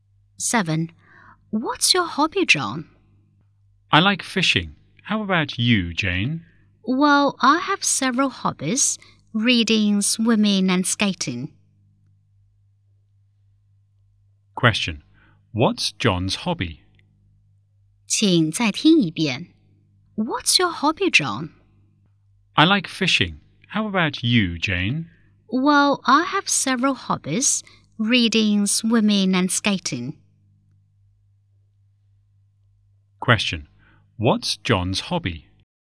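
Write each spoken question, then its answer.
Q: What's John's hobby?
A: Fishing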